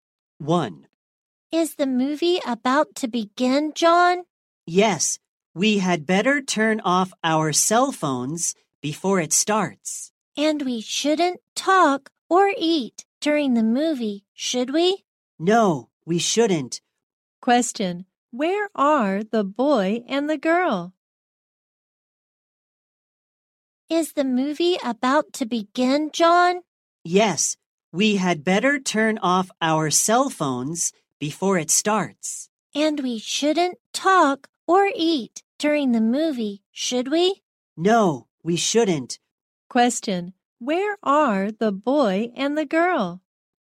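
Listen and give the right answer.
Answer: At a movie theater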